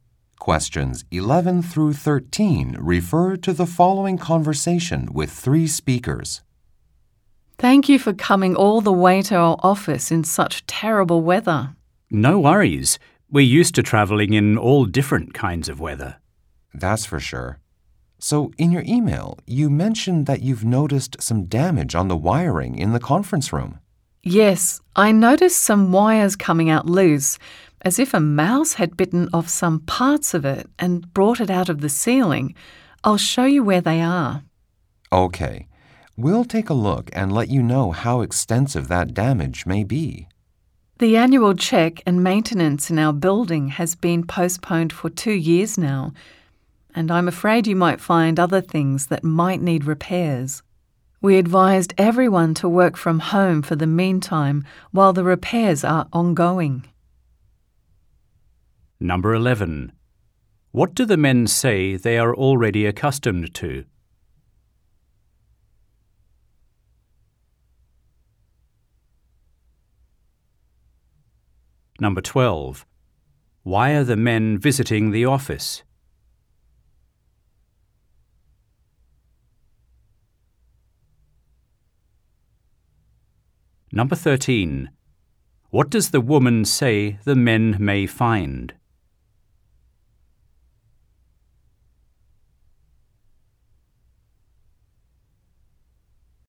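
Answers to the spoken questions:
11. Traveling in all kinds of weather
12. To check damaged wiring in the conference room
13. Other things that need repairs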